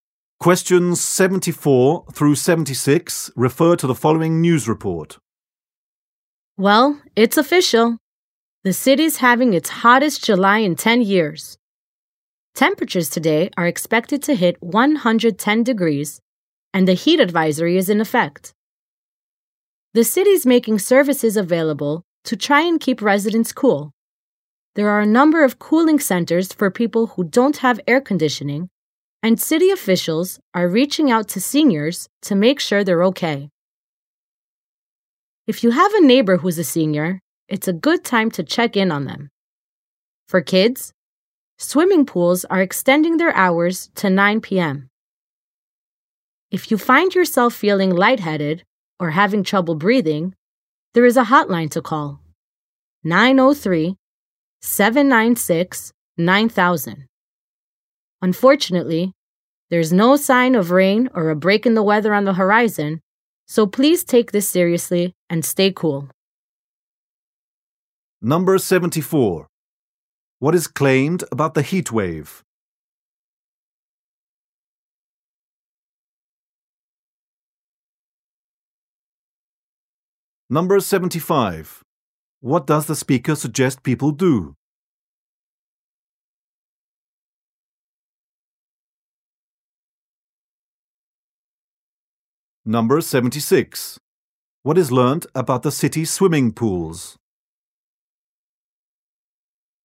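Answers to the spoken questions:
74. It is the city's hottest July in 10 years
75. Check on senior neighbors
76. They are staying open until 9 p.m.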